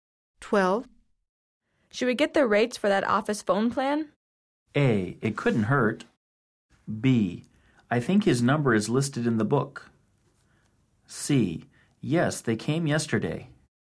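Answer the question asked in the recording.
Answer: A: It couldn't hurt.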